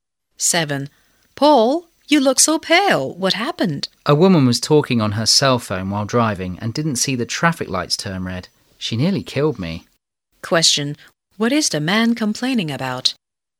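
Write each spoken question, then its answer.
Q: What is the man complaining about?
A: A woman driver on her phone ran a red light and nearly hit him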